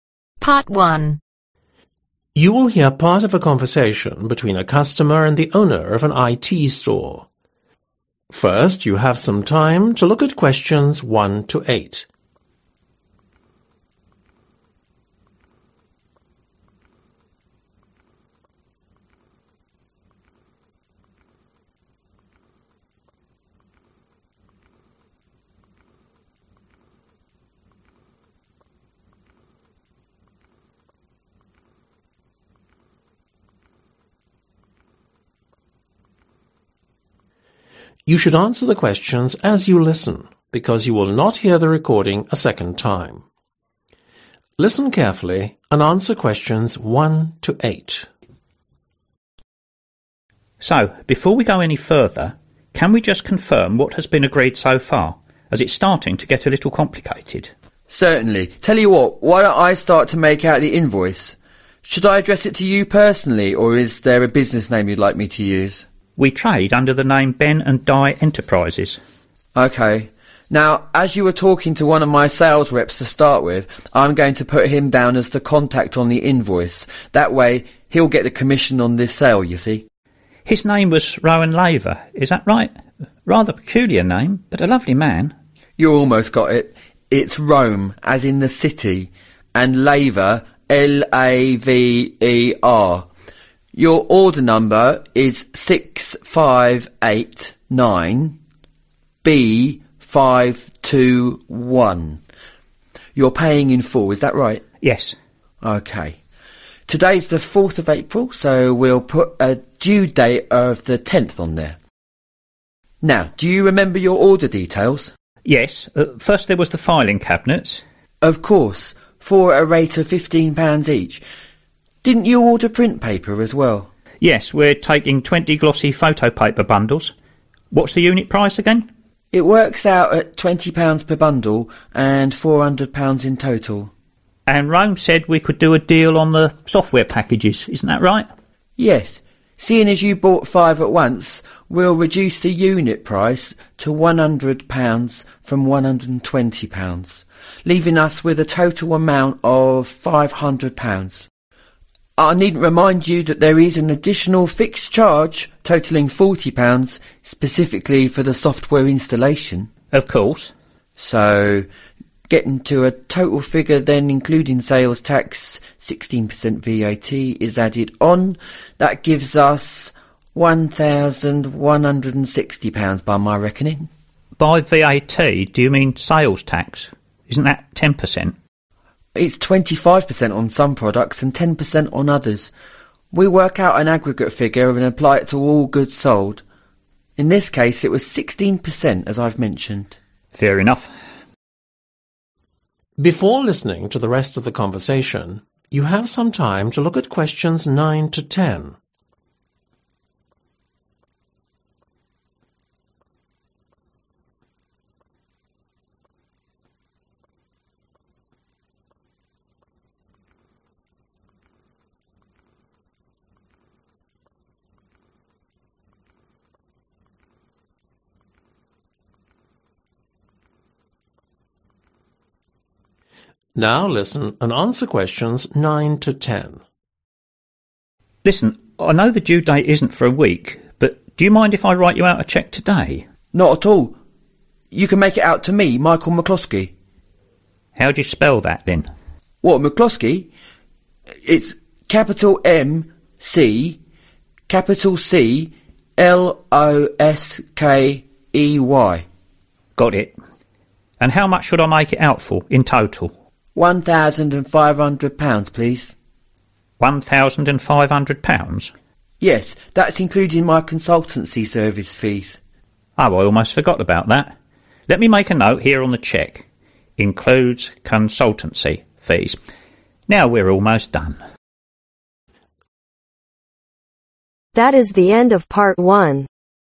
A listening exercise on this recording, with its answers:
Complete the form below. Write ONE WORD/OR A NUMBER for each answer.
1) (1)............ Layer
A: Rome

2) Order number: (2)............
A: 6589B521

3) filling (3)............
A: Cabinets

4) print paper (4)............ photo paper bundles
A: Glossy

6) An additional (6)............ fee for the software (7)............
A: Fixed

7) An additional (6)............ fee for the software (7)............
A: Installation